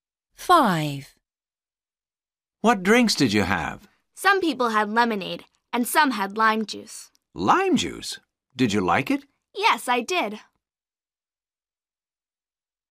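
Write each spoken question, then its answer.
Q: What drinks did you have?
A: lemonade and lime juice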